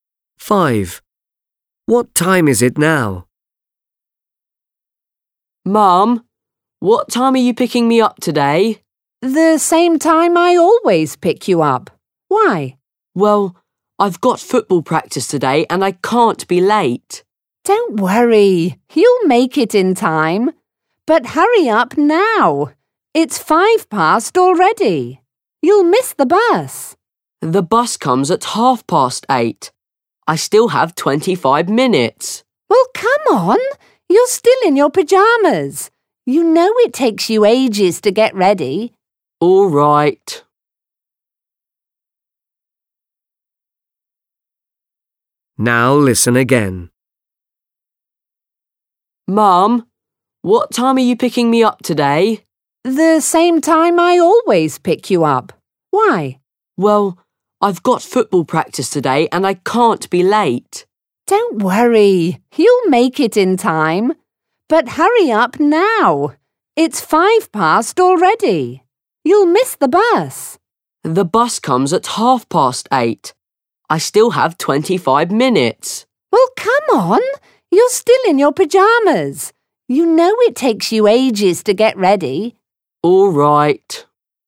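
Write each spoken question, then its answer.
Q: What time is it now?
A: 8:05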